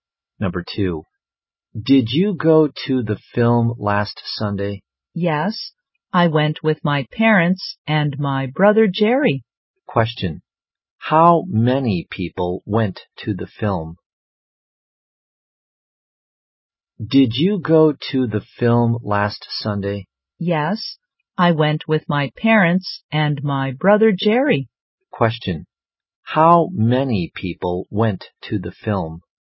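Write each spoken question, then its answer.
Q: how many people went to the film?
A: Four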